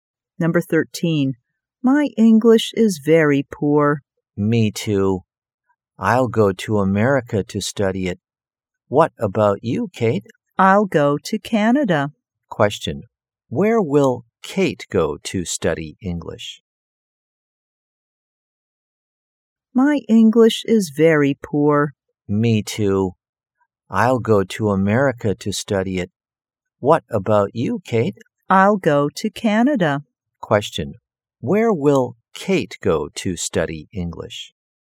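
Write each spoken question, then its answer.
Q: Where will Kate go to study English?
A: Canada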